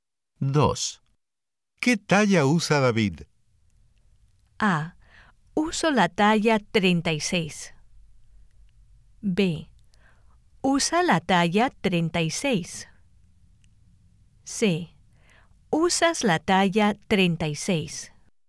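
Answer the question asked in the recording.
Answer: B: Usa la talla 36.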